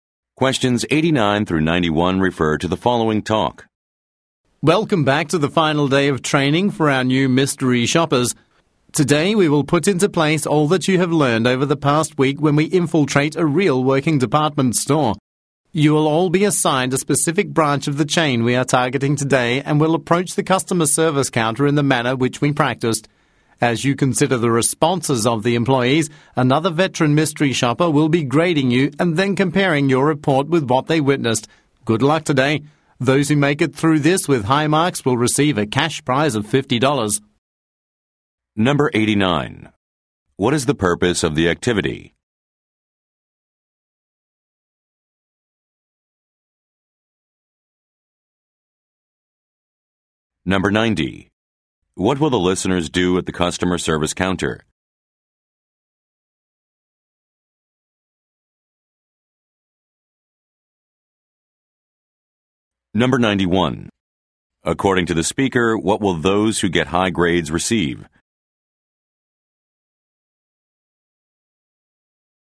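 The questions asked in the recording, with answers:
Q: What is the purpose of the activity?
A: Final training for new mystery shoppers

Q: What will the listeners do at the customer service counter?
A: Approach it as practiced and assess the employees' responses

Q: According to the speaker, what will those who get high grades receive?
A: A $50 cash prize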